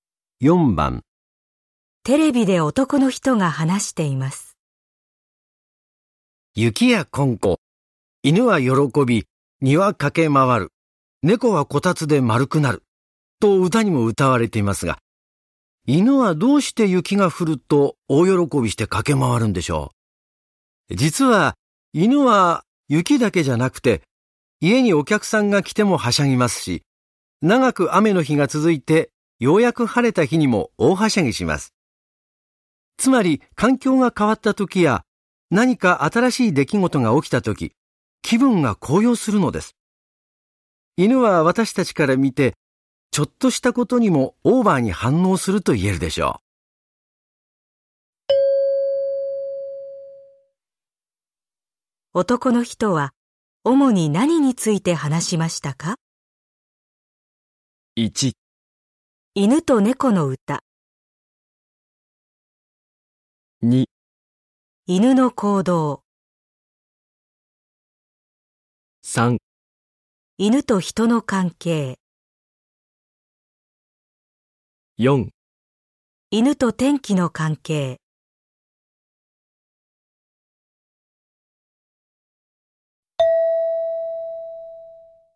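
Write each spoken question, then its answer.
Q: 男の人は主に何について話しましたか?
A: 2: 犬の行動。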